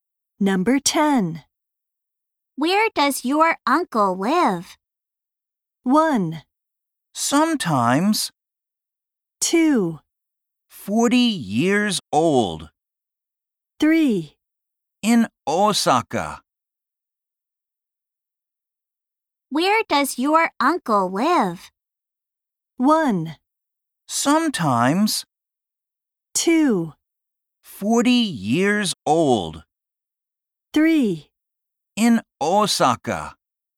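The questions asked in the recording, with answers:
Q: Where does your uncle live?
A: 3: In Osaka.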